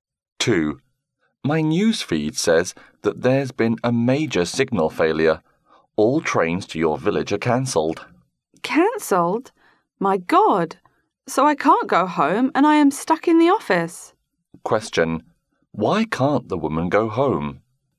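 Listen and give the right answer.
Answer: Her trains were cancelled because of a major signal failure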